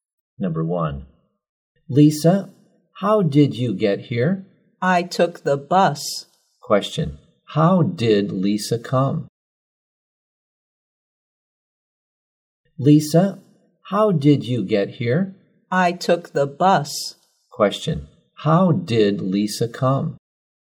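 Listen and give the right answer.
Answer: By bus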